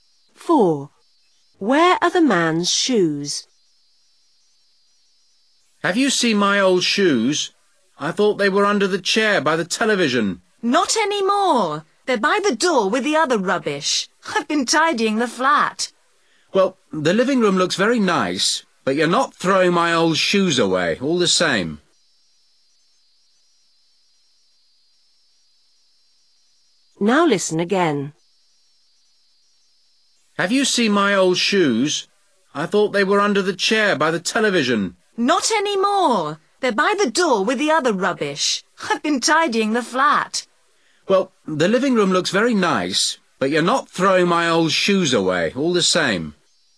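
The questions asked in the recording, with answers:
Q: Where are the man's shoes?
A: By the door with the rubbish

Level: lớp 6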